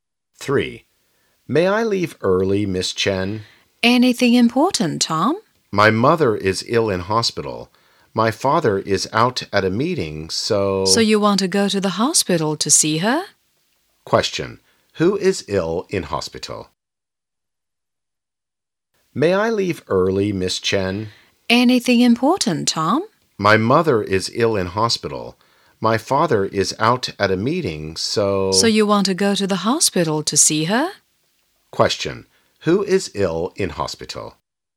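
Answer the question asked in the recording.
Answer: Tom's mother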